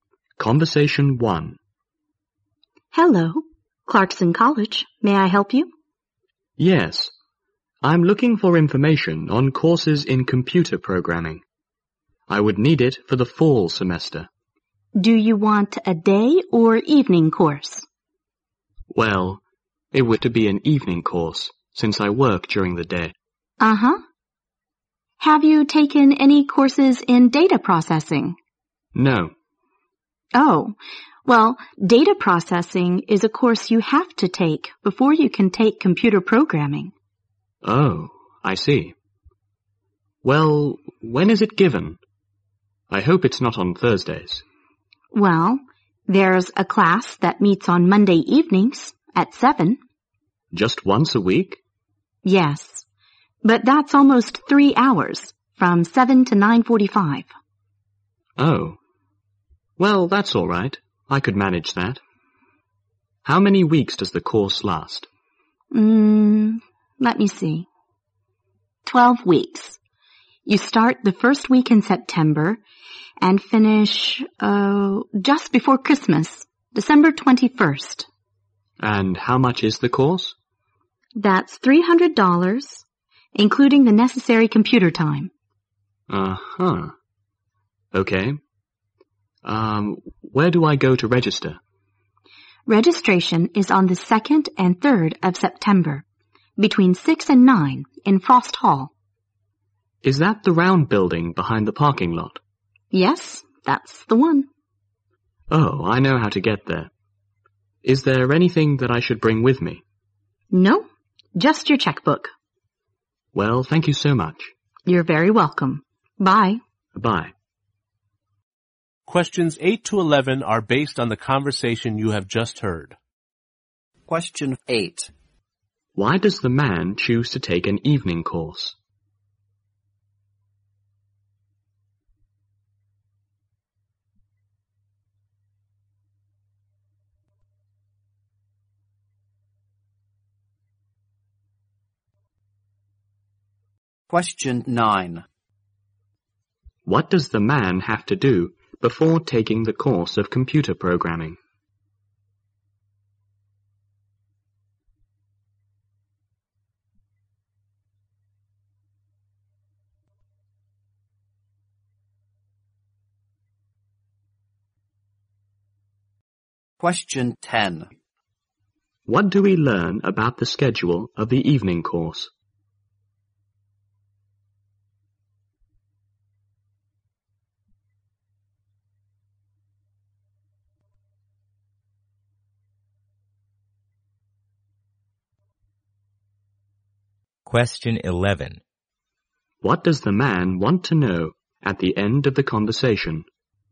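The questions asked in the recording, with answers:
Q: Why does the man choose to take an evening course?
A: Because he works during the day.

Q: What does the man have to do before taking the course of computer programming?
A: Take a course in data processing.

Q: What does the man want to know at the end of the conversation?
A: Whether he should bring anything with him to registration.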